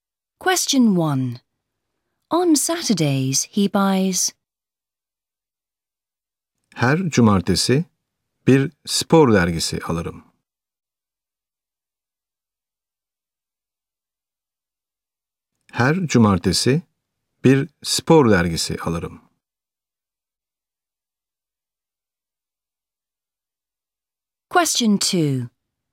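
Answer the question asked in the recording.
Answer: a sports magazine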